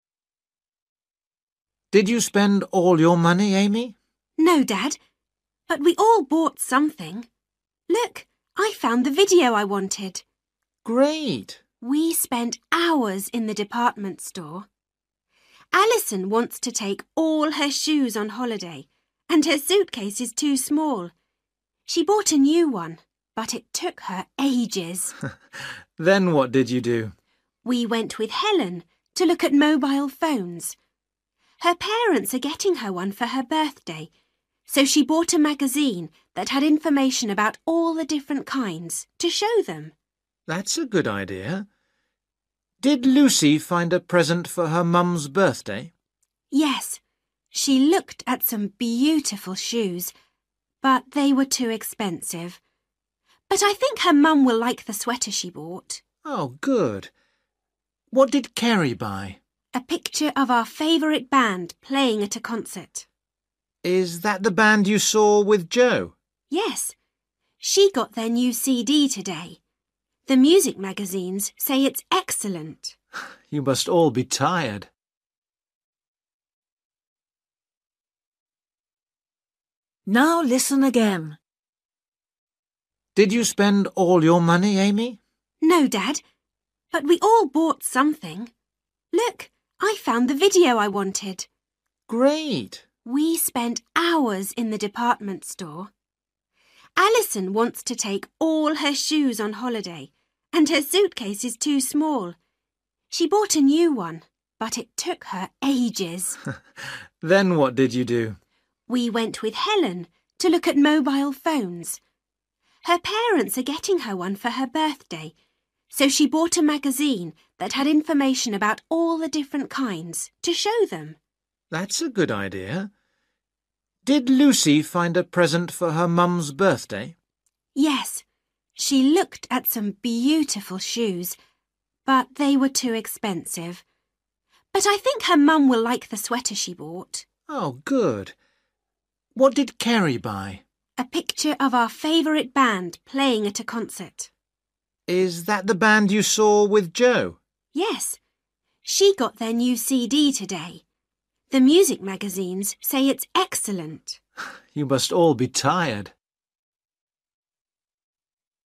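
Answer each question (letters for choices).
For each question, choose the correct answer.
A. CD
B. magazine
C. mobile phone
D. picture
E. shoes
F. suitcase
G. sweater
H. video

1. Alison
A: F

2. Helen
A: B

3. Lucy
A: G

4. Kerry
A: D

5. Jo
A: A

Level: Luyện nghe trình độ A2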